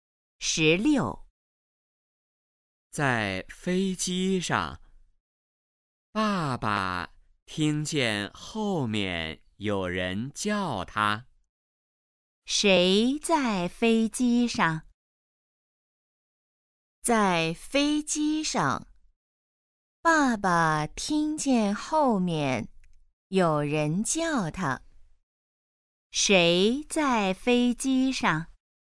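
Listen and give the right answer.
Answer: 爸爸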